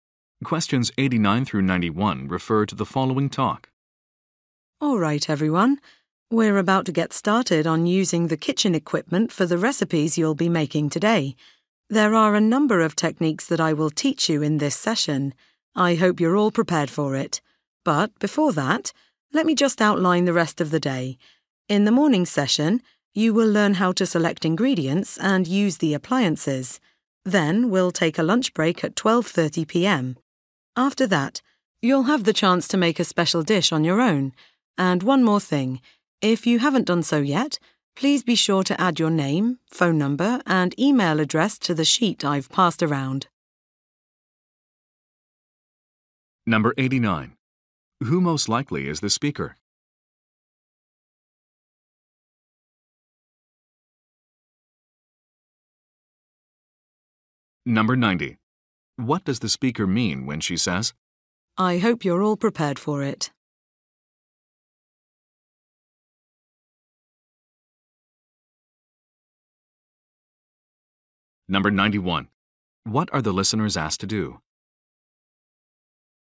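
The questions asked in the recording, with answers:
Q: Who most likely is the speaker?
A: A cooking instructor

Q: What are the listeners asked to do?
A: Write their contact details on a sheet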